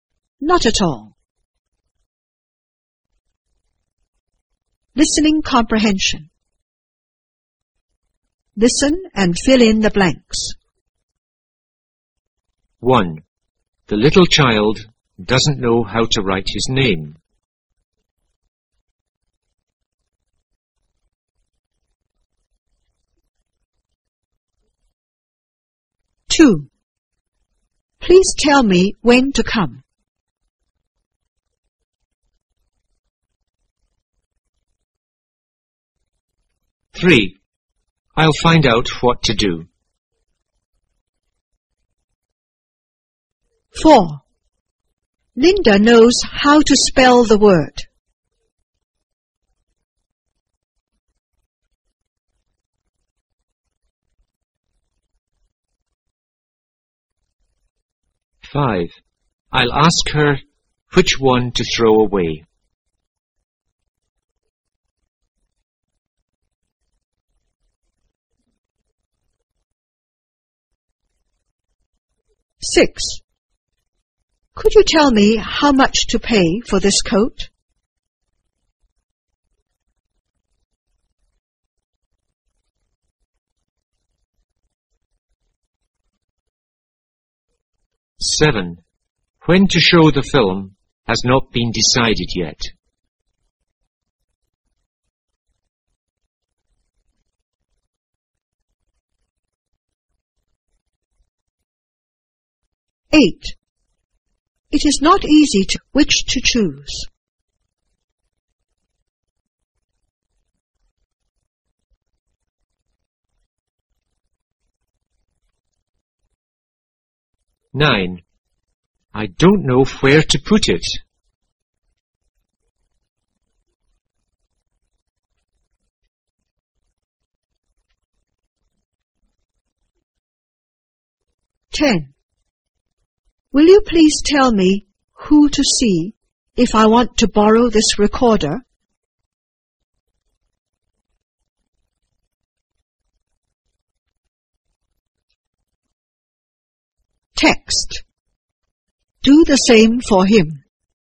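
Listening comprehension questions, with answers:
Listen and fill in the blanks.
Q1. The little child doesn't know__his name.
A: how to write

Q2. Please tell me__.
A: when to come

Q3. I'll find out__.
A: what to do

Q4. Linda knows__the word.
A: how to spell

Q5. I'll ask her__away.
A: which one to throw

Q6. Could you tell me__for this coat?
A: how much to pay

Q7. __has not been decided yet.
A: When to show the film

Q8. It is not easy to decide__.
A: which to choose

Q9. I don't know__it.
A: where to put

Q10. Will you please tell me __if I want to borrow this recorder?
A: who to see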